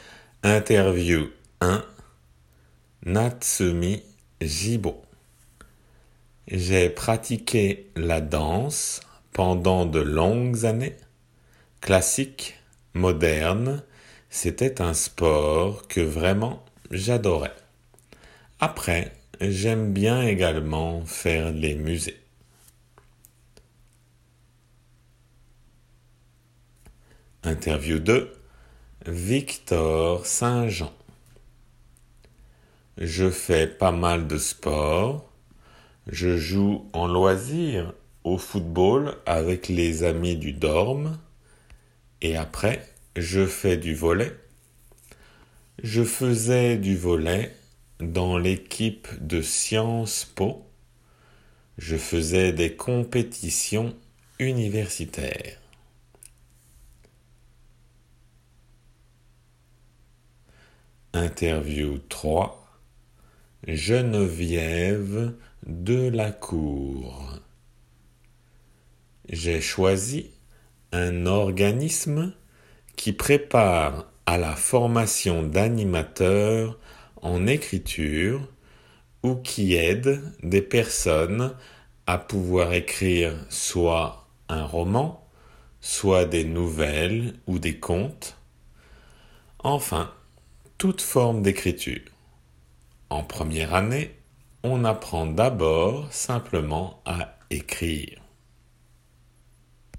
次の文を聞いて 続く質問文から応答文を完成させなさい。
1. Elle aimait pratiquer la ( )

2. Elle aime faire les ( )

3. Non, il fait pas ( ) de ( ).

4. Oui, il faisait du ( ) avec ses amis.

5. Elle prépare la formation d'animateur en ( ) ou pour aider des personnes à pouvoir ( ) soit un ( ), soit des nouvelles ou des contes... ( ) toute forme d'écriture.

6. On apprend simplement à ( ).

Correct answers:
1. danse
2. musées
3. mal sports
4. football
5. écriture écrire roman enfin
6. écrire

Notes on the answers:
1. J'ai pratiqué la danse pendant de longues années, classique, moderne.
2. Après, j'aime bien également faire les musées.
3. Je fais pas mal de sports.
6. En première année, on apprend d'abord simplement à écrire.